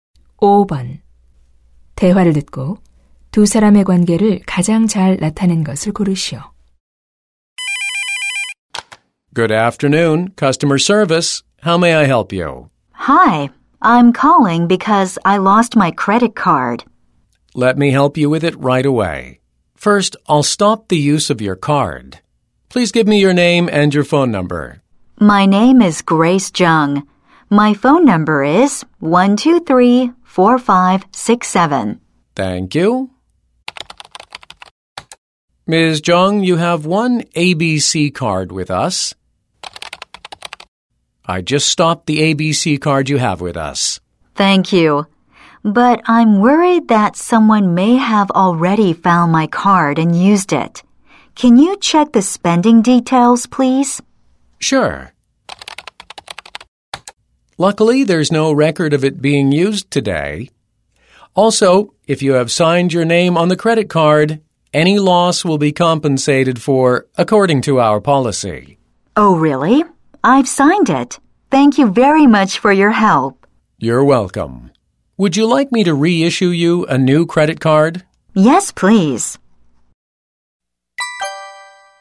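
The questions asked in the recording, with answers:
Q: 대화를 듣고 두 사람의 관계를 가장 잘 나타낸 것을 고르시오.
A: 카드사 고객 서비스 상담원 - 고객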